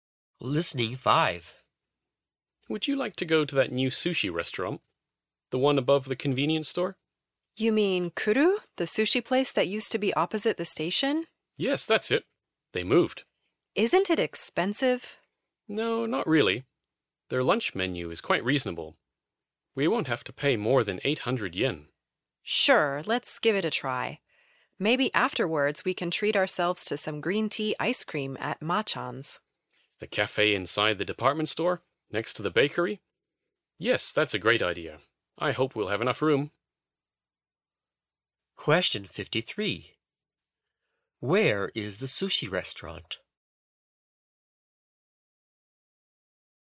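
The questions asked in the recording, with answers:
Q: Where is the sushi restaurant?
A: Above the convenience store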